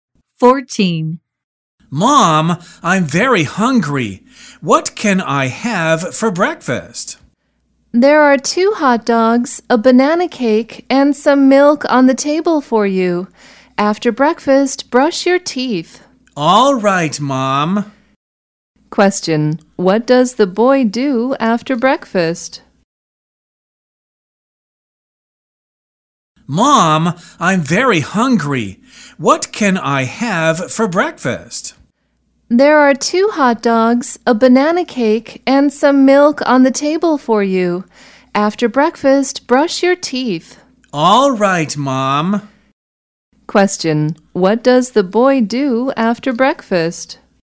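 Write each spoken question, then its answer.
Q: Question, what does the boy do after breakfast?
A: He brushes his teeth.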